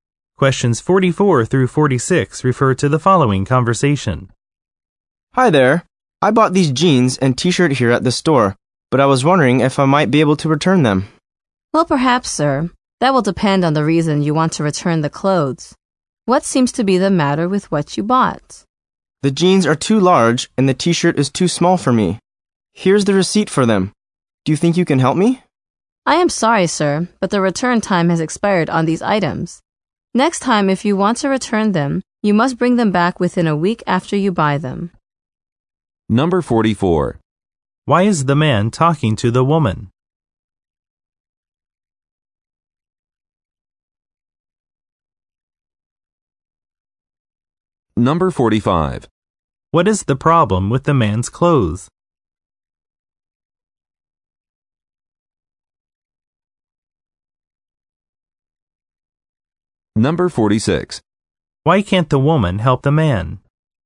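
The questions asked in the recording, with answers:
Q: Why is the man talking to the woman?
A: He wants to return clothes he bought

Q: What is the problem with the man's clothes?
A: The jeans are too large and the t-shirt is too small

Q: Why can't the woman help the man?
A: The return time has expired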